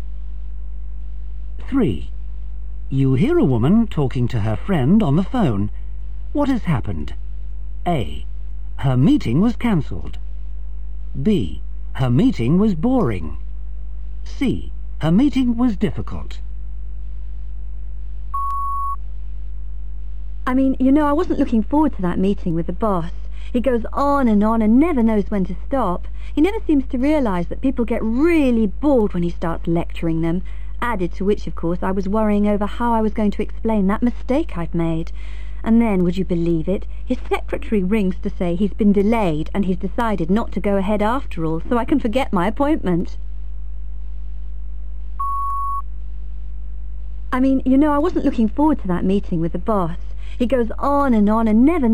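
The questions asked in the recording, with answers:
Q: What has happened?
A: A: Her meeting was cancelled.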